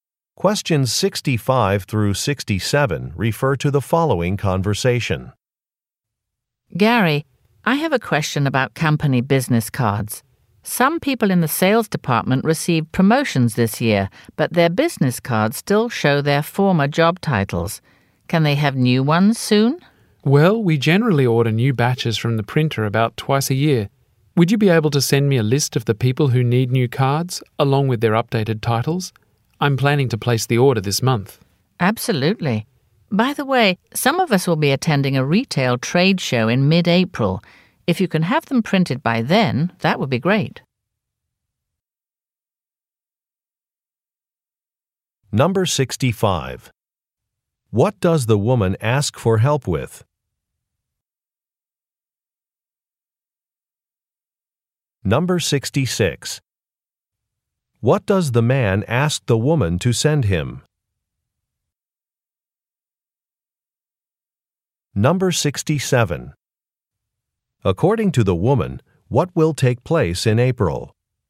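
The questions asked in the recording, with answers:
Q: What does the woman ask for help with?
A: Getting new business cards with updated job titles

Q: What does the man ask the woman to send him?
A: A list of people needing new cards with their updated titles

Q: According to the woman, what will take place in April?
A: A retail trade show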